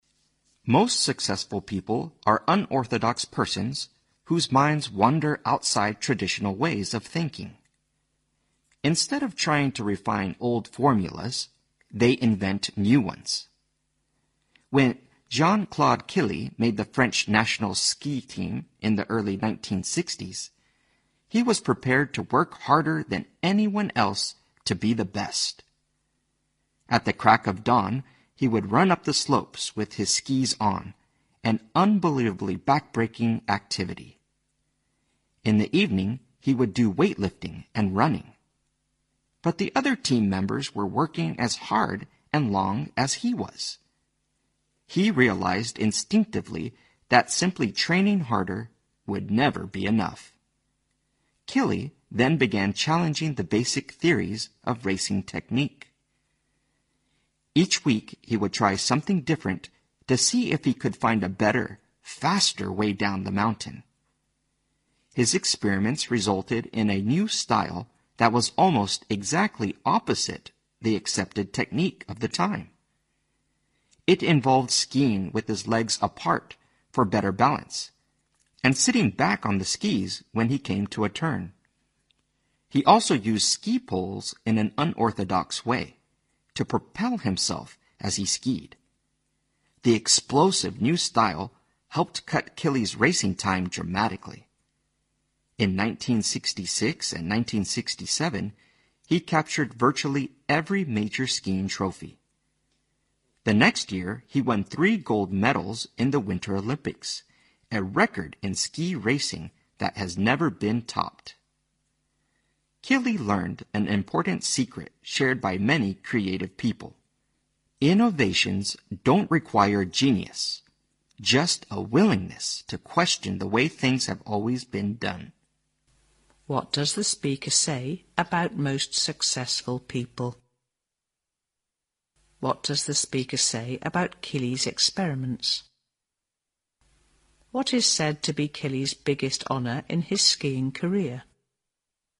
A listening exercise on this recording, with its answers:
What does the speaker say about most successful people?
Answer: They break away from traditional ways of thinking.

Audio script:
A
[听力原文] Most successful people are unorthodox persons whose minds wander outside traditional ways of thinking. Instead of trying to refine old formulas, they invent new ones. When Jean-Claude Killy made the French National Ski Team in the early 1960s he was prepared to work harder than anyone else to be the best. At the crack of dawn he would run up the slopes with his skis on, an unbelievably backbreaking activity. In the evening, he would do weightlifting and running. But the other team members were working as hard and long as he was. He realized instinctively that simply training harder would never be enough. Killy then began challenging the basic theories of racing technique. Each week he would try something different to see if he could find a better, faster way down the mountain. His experiments resulted in a new style that was almost exactly opposite the accepted technique of the time. It involved skiing with his legs apart for better balance and sitting back on the skis when he came to a turn. He also used ski poles in an unorthodox way to propel himself as he skied. The explosive new style helped cut Killy's racing time dramatically. In 1966 and 1967, he captured virtually every major skiing trophy. The next year, he won three gold medals in the Winter Olympics, a record in ski racing that has never been topped. Killy learned an important secret shared by many creative people: innovations don't require genius, just a willingness to question the way things have always been done.